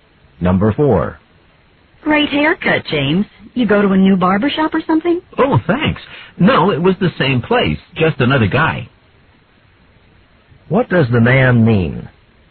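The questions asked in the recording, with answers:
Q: What does the man mean?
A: A different barber cut his hair at the same shop.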